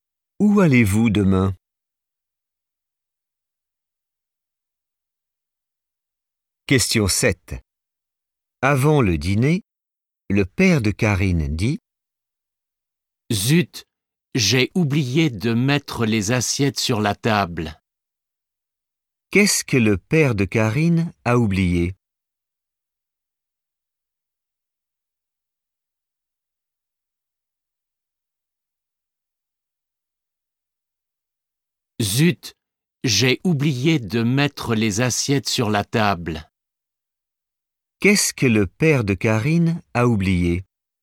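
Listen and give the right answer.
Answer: de mettre les assiettes sur la table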